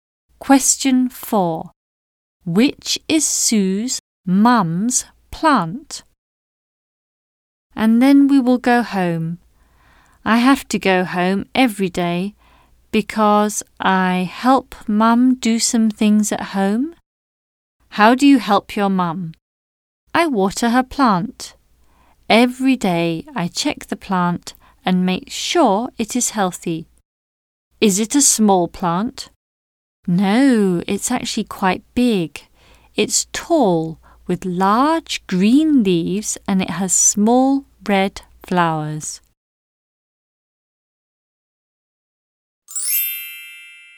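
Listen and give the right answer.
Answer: The tall plant with large green leaves and small red flowers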